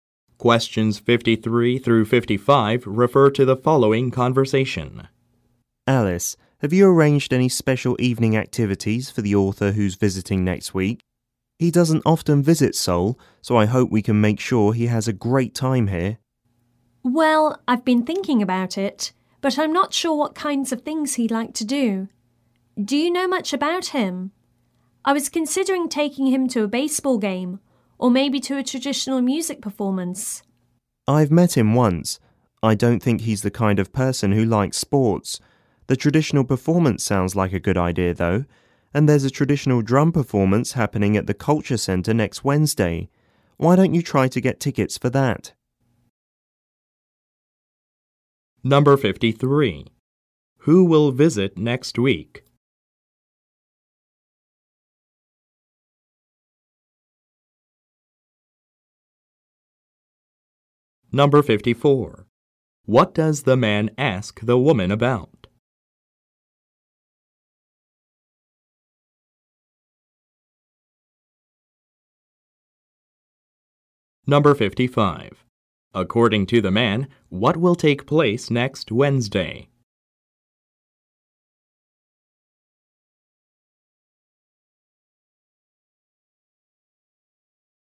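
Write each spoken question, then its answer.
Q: Who will visit next week?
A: An author

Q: What does the man ask the woman about?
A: Whether she has arranged evening activities for the visiting author

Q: According to the man, what will take place next Wednesday?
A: A traditional drum performance at the Culture Center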